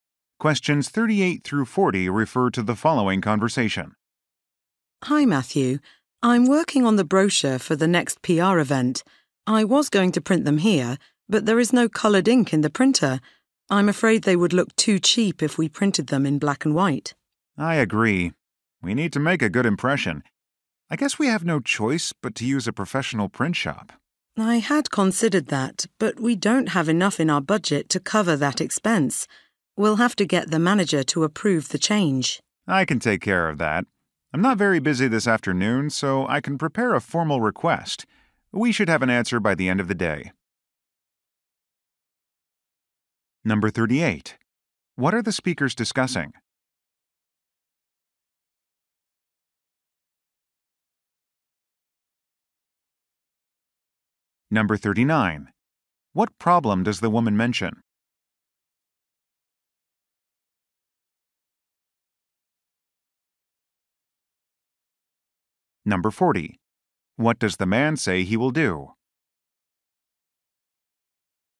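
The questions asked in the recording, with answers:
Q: What are the speakers discussing?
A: Printing brochures for a PR event.

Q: What problem does the woman mention?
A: The printer has no colored ink.

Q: What does the man say he will do?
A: Prepare a formal request for the manager's approval.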